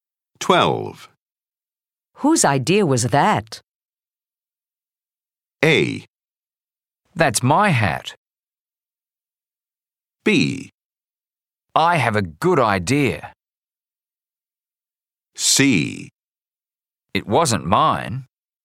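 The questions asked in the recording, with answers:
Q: Whose idea was that?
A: C: It wasn't mine.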